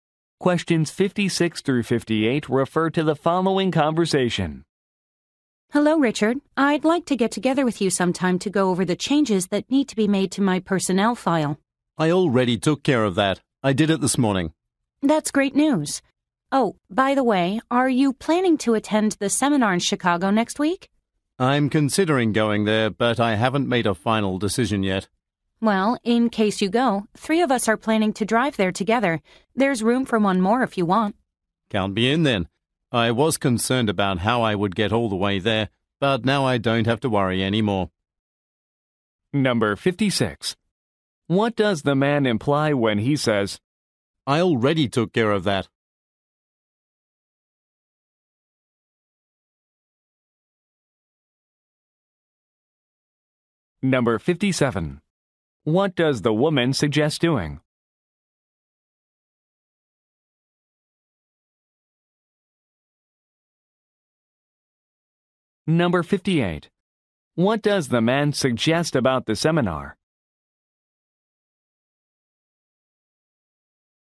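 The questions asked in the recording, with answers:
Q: I already took care of that?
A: He already updated her personnel file

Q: What does the woman suggest doing?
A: Driving to the seminar together

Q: What does the man suggest about the seminar?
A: He will attend it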